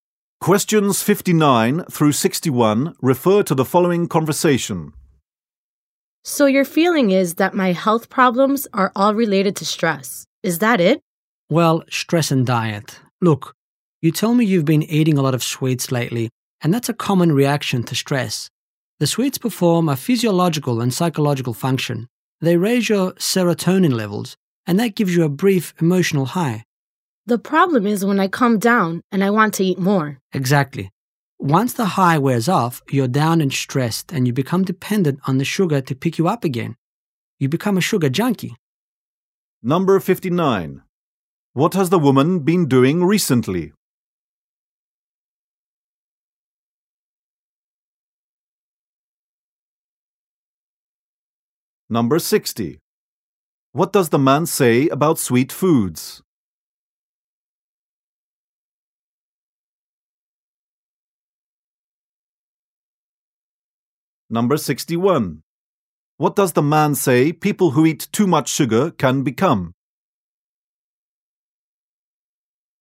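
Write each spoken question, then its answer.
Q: What has the woman been doing recently?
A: Eating a lot of sweets

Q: What does the man say about sweet foods?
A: They raise serotonin and give a brief emotional high

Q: What does the man say people who eat too much sugar can become?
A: Sugar junkies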